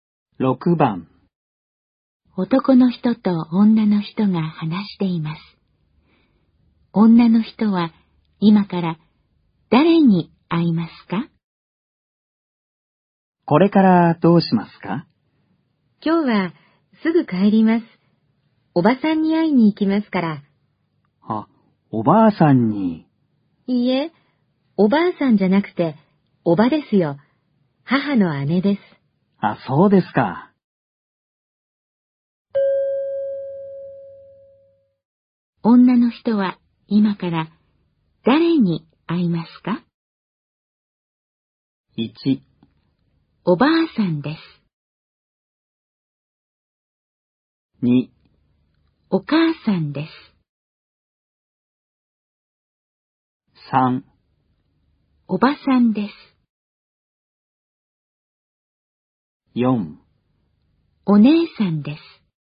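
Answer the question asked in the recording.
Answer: 3: おばさんです。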